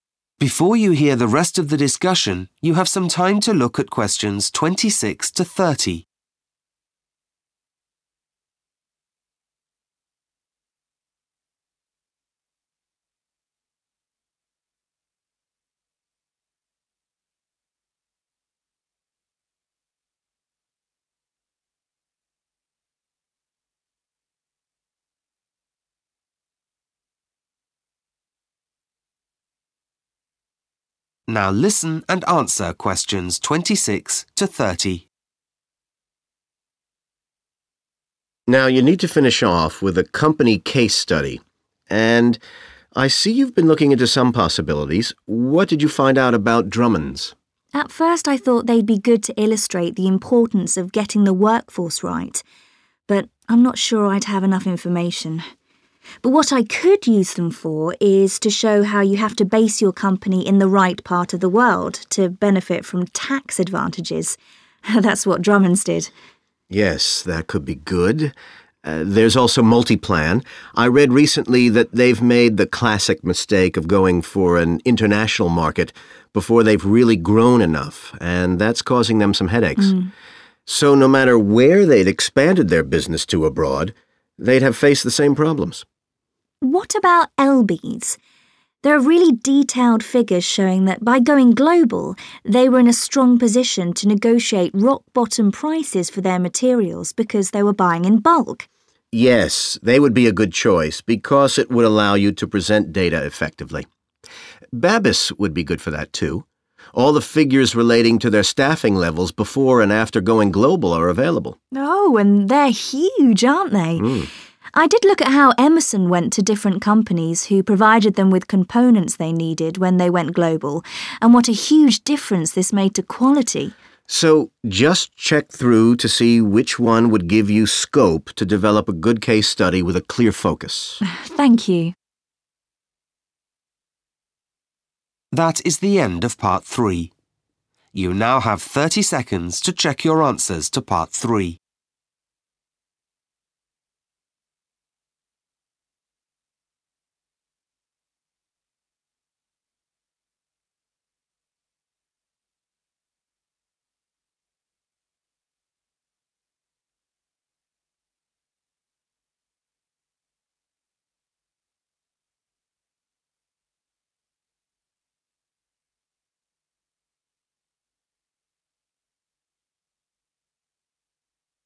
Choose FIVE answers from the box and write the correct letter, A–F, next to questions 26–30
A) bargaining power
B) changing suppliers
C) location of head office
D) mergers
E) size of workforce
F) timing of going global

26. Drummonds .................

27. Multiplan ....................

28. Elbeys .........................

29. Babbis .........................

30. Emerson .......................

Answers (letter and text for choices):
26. C) location of head office
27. F) timing of going global
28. A) bargaining power
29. E) size of workforce
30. B) changing suppliers